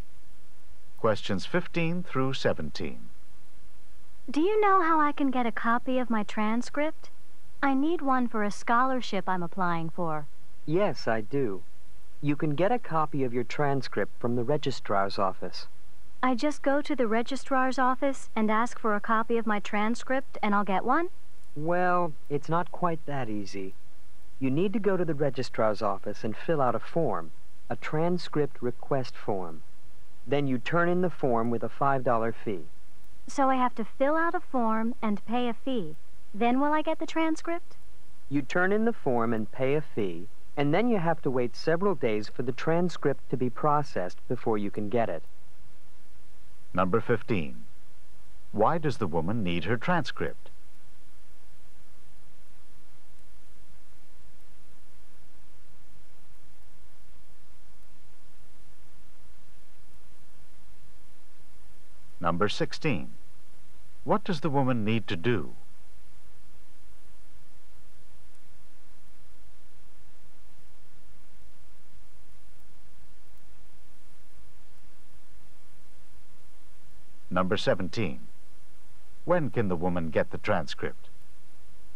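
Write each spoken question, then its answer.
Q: Why does the woman need her transcript?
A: For a scholarship she is applying for

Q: What does the woman need to do?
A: Fill out a transcript request form at the registrar's office and pay a $5 fee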